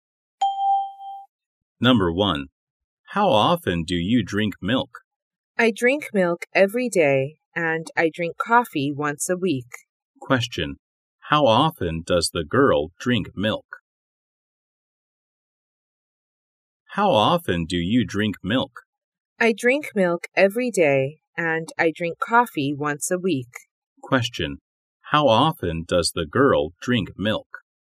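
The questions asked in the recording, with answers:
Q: Question, how often does the girl drink milk?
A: Every day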